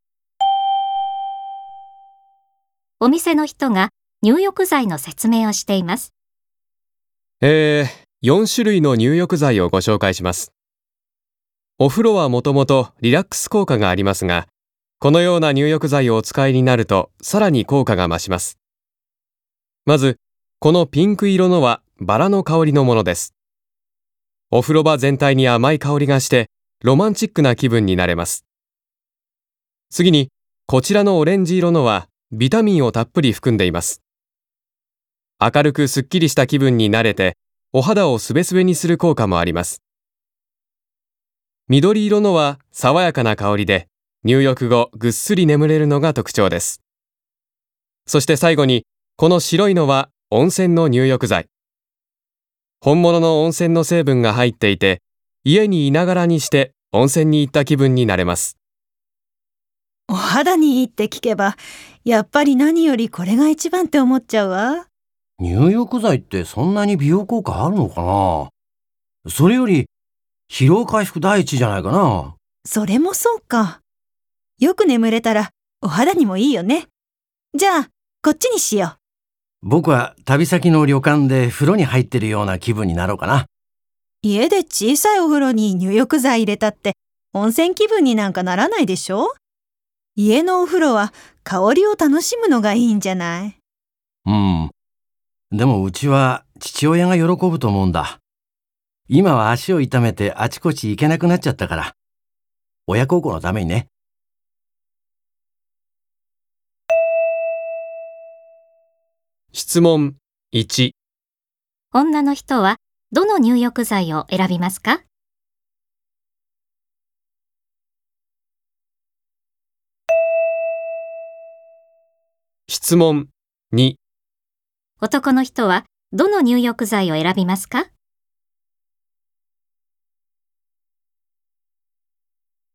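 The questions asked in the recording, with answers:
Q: 女の人はどの入浴剤を選びますか?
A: 緑色の入浴剤(爽やかな香りでぐっすり眠れるもの)

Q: 男の人はどの入浴剤を選びますか?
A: 白い温泉の入浴剤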